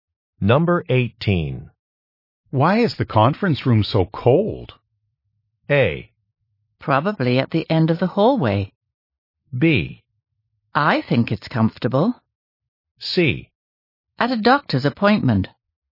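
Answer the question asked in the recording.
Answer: B: I think it's comfortable.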